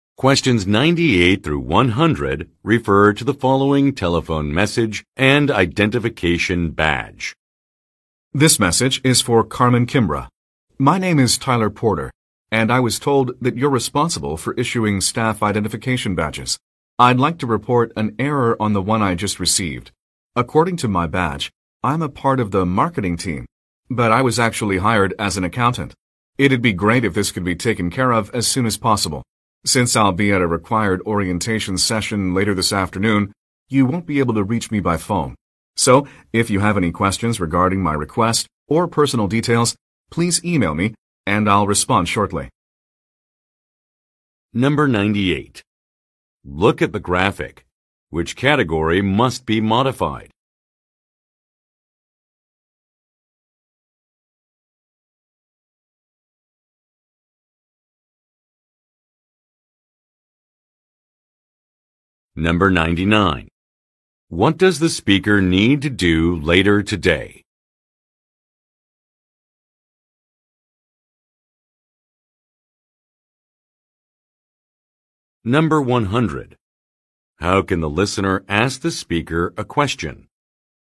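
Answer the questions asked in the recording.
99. Attend a required orientation session
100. By email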